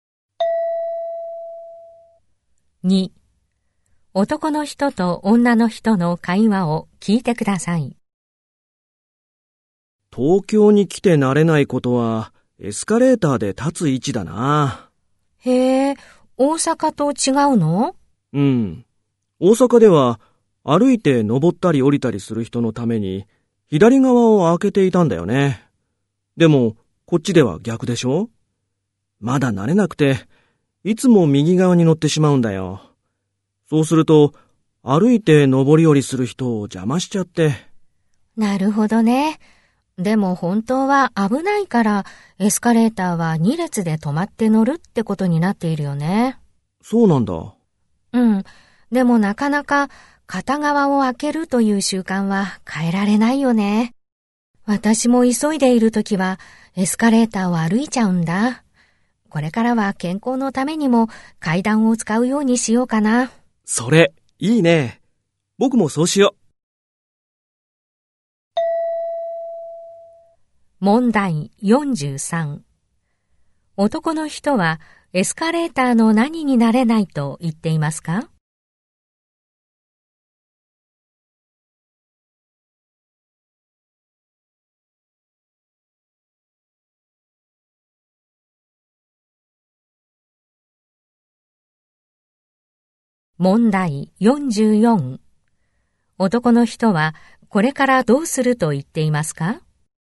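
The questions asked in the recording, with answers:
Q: 男の人はエスカレーターの何になれないと言っていますか?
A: 立つ位置

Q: 男の人はこれからどうすると言っていますか?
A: 階段を使うようにする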